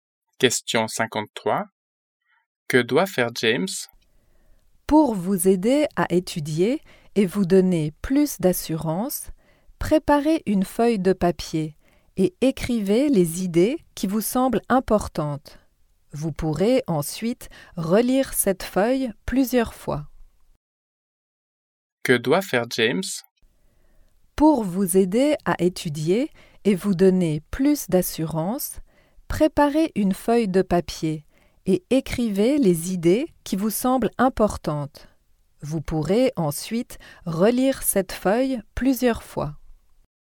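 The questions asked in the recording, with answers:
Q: Que doit faire James?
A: Écrire les idées importantes sur une feuille de papier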